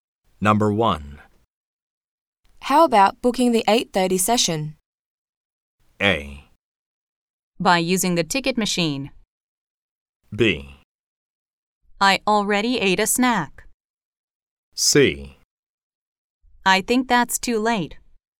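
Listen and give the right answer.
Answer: C: I think that's too late.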